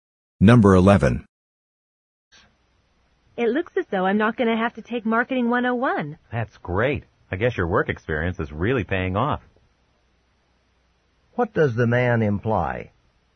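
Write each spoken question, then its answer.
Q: What does the man imply?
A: Her work experience excused her from Marketing 101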